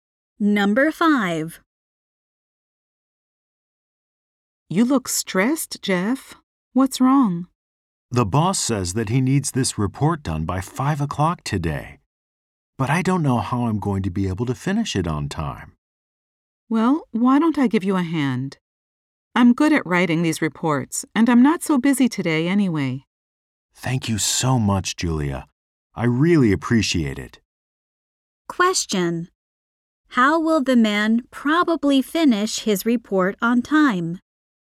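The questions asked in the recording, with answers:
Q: How will the man probably finish his report on time?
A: Julia will help him write it.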